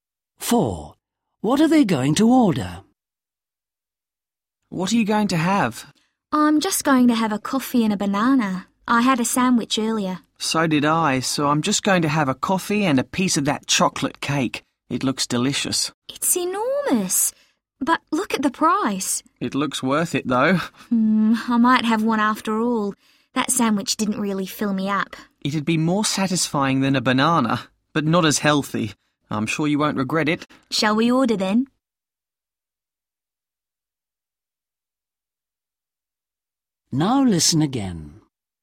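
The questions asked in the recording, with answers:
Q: What are they going to order?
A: Coffee and chocolate cake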